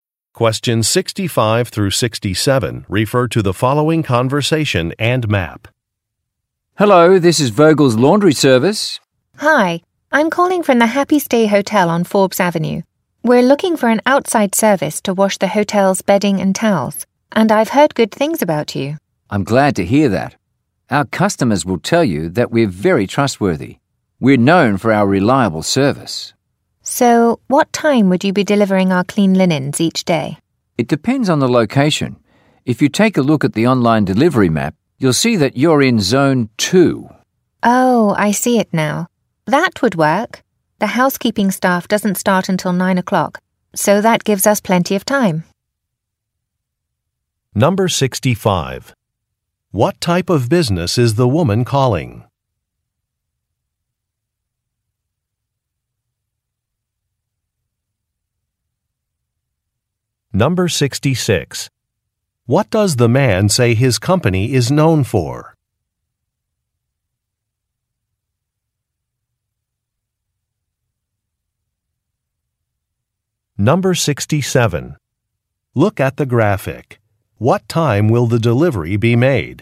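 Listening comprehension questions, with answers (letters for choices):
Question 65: What type of business is the woman calling?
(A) A catering company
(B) A laundry service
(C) A flower shop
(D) A furniture store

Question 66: What does the man say his company is known for?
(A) Its prices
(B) Its locations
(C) Its reliability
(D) Its products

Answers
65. B
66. C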